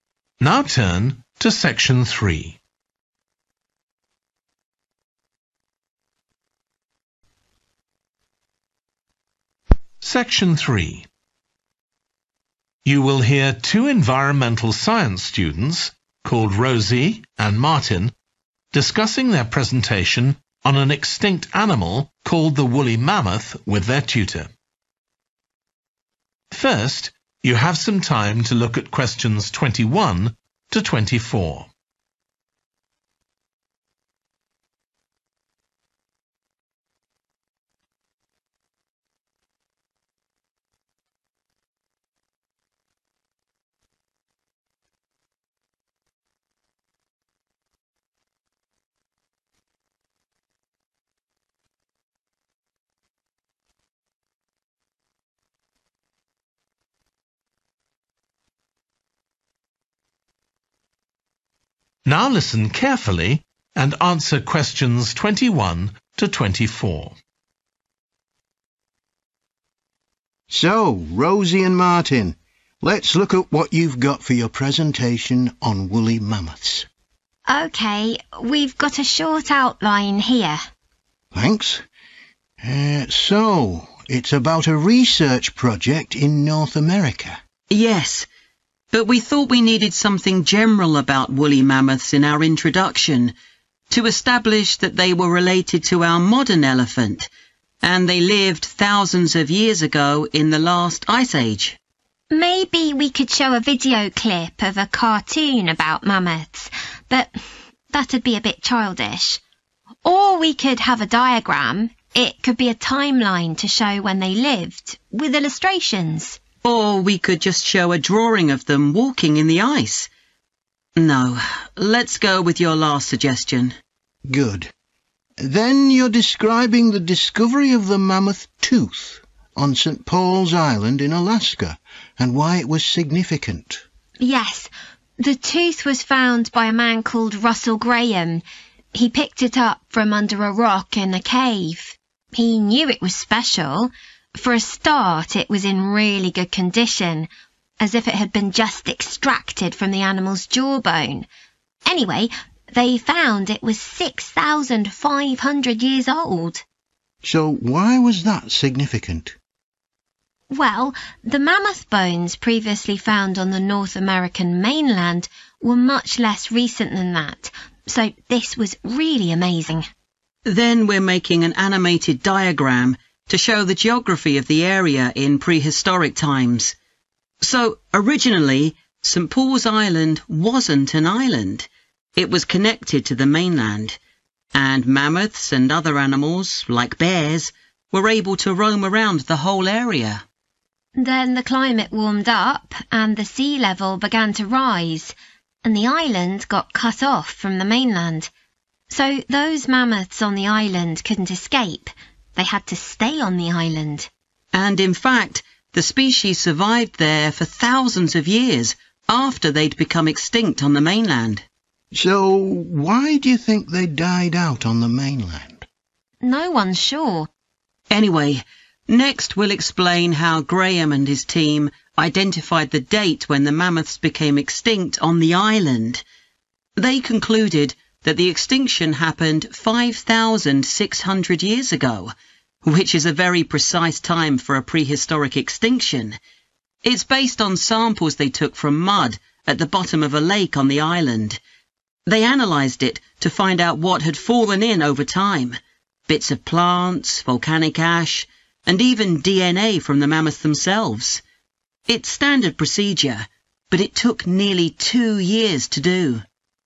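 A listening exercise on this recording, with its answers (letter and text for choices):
Choose the correct letter, A, B or C.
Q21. How will Rosie and Martin introduce their presentation?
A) with a drawing of woolly mammoths in their natural habitat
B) with a timeline showing when woolly mammoths lived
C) with a video clip about woolly mammoths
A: A) with a drawing of woolly mammoths in their natural habitat

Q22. What was surprising about the mammoth tooth found by Russell Graham?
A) It was still embedded in the mammoth's jawbone.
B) It was from an unknown species of mammoth.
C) It was not as old as mammoth remains from elsewhere.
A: C) It was not as old as mammoth remains from elsewhere.

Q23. The students will use an animated diagram to demonstrate how the mammoths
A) became isolated on the island.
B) spread from the island to other areas.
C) coexisted with other animals on the island.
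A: A) became isolated on the island.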